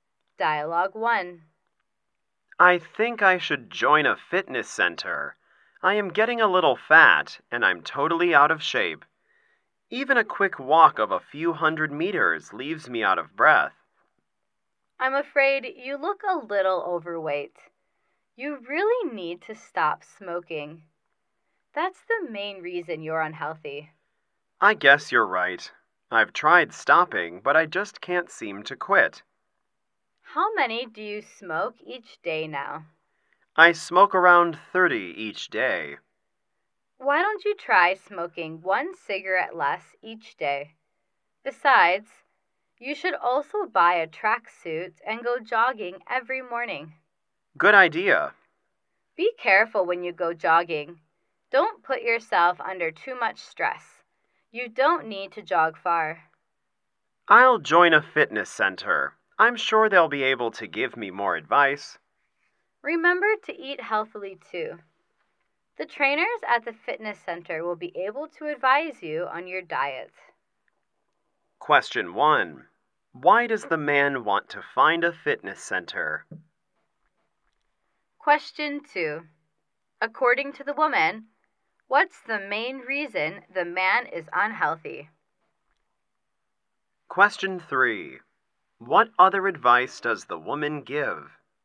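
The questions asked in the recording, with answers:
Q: Why does the man want to find a fitness center?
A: He is getting a little fat and is totally out of shape.

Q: According to the woman, what's the main reason the man is unhealthy?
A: Smoking.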